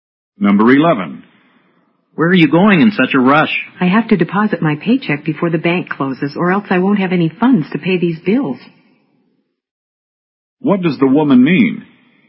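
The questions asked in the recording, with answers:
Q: What does the woman mean?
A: She has to get to the bank before it closes to deposit her paycheck so she can pay her bills.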